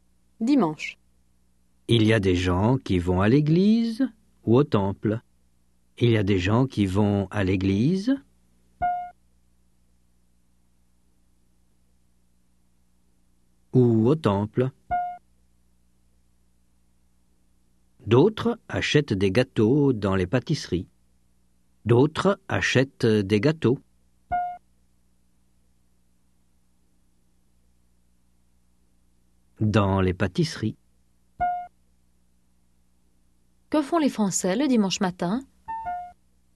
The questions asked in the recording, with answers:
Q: Que font les Français le dimanche matin?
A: Ils vont à l'église ou au temple, où ils achètent des gâteaux dans les pâtisseries.